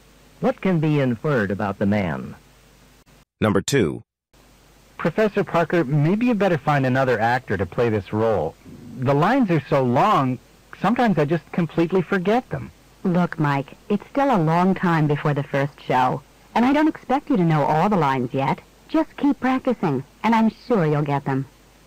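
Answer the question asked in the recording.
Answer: Keep practicing his lines.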